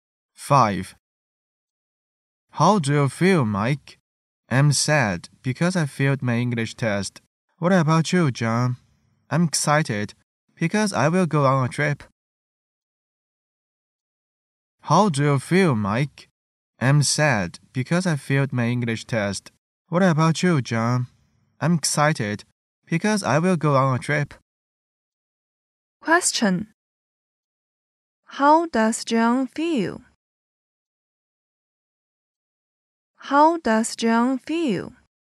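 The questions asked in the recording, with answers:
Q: How does John feel?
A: Excited.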